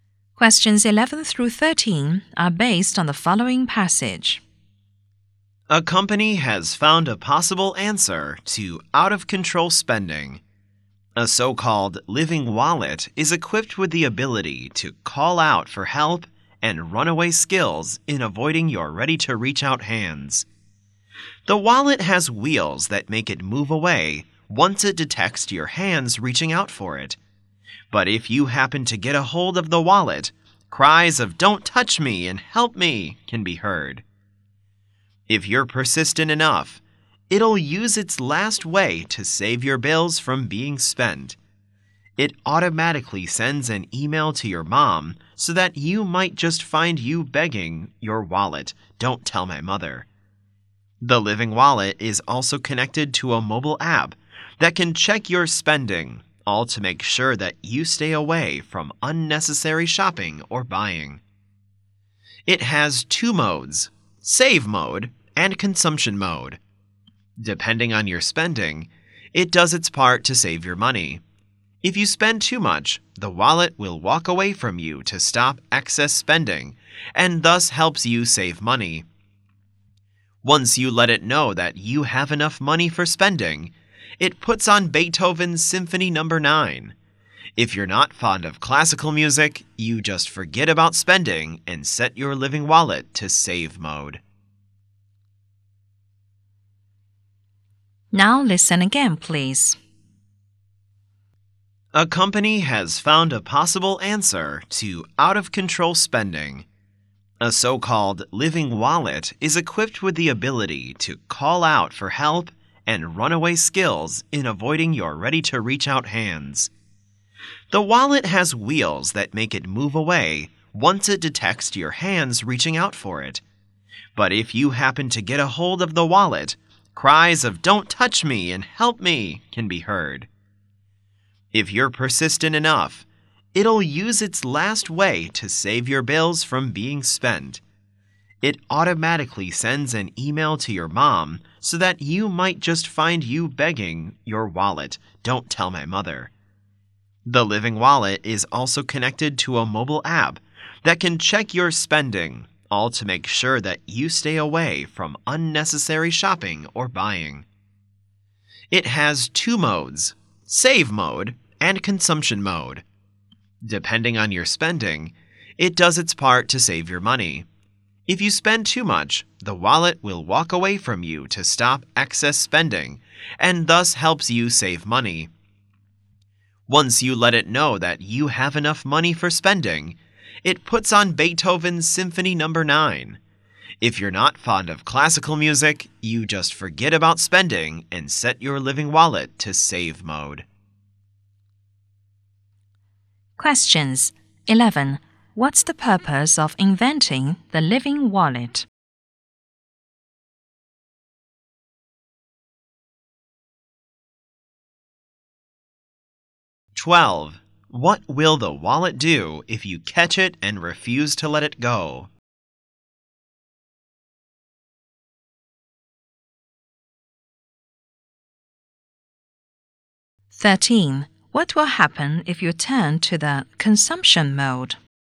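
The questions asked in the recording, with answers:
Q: What's the purpose of inventing the living wallet?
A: To help people control their spending and save money

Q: What will the wallet do if you catch it and refuse to let it go?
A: It sends an email to your mom

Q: What will happen if you turn to the consumption mode?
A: It plays Beethoven's Symphony No. 9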